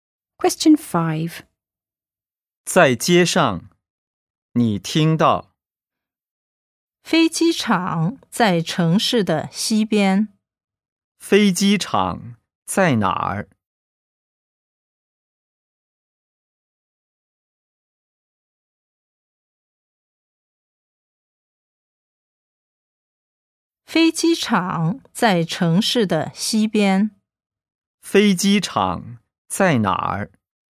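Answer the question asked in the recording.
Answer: 城市的西边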